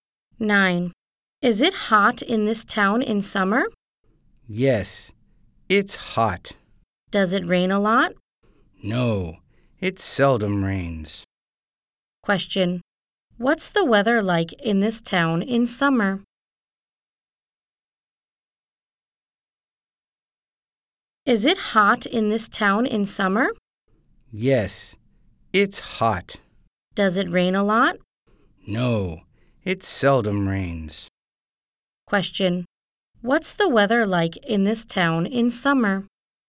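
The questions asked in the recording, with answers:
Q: What's the weather like in this town in summer?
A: Hot and it seldom rains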